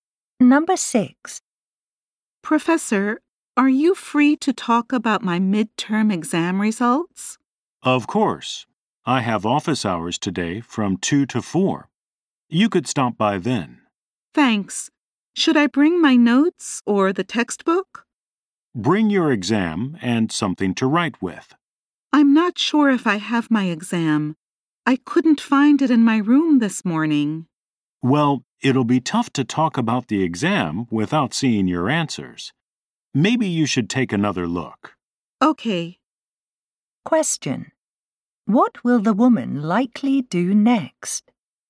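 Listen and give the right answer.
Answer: Look for her exam again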